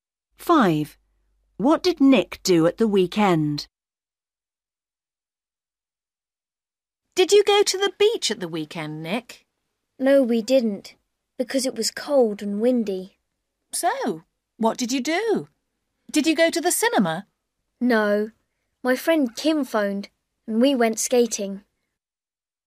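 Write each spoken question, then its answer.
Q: What did Nick do at the weekend?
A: He went skating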